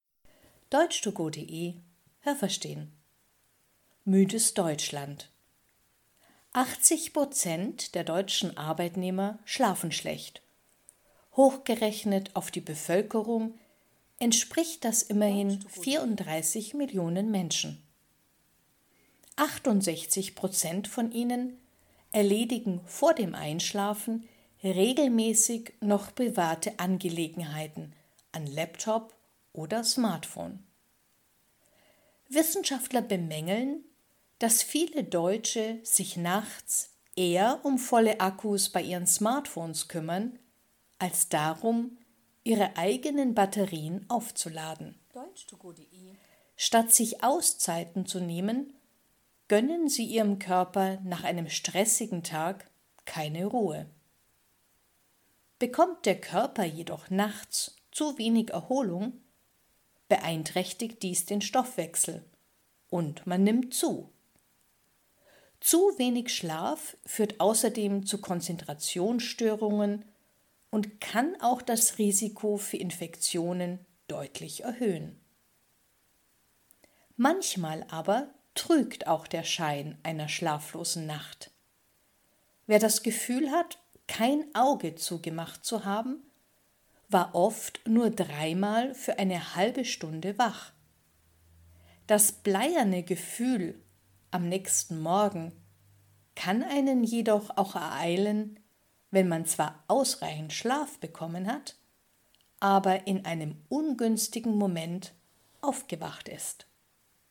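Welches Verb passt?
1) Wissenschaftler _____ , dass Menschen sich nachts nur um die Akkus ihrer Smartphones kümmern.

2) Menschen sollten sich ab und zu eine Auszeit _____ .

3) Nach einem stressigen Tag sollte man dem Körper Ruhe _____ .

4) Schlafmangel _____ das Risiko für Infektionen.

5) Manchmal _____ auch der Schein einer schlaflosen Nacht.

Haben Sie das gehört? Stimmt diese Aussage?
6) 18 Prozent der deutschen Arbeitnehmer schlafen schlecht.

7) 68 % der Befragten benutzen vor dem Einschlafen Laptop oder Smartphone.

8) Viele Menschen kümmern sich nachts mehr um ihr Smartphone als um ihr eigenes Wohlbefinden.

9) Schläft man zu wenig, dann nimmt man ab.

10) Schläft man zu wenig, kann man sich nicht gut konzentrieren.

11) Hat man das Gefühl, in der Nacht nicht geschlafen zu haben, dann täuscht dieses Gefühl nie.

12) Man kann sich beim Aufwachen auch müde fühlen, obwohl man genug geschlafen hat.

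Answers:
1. bemängeln
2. nehmen
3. gönnen
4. erhöht
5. trügt
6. falsch
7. richtig
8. richtig
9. falsch
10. richtig
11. falsch
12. richtig

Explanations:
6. Das sind 80 Prozent.
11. Man hat vielleicht das Gefühl, überhaupt nicht geschlafen zu haben, war aber oft nur dreimal eine halbe Stunde wach.
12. Dann ist man zu einem ungünstigen Zeitpunkt aufgewacht.

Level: Hörtexte B (mittel)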